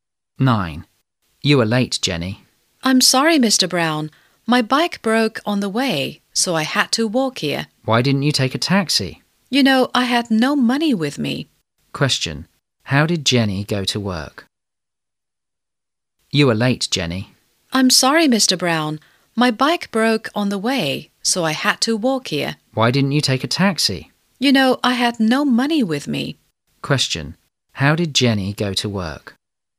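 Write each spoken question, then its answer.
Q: Question. How did Jenny go to work?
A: She walked (on foot)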